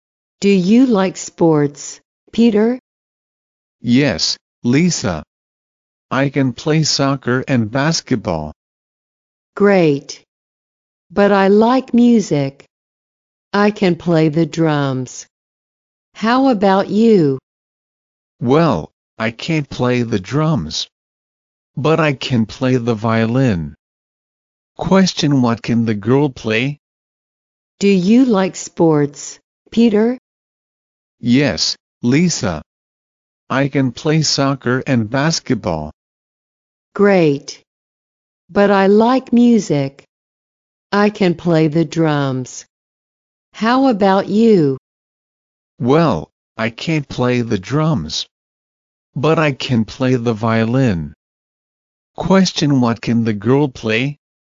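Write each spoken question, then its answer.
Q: Question, what can the girl play?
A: The drums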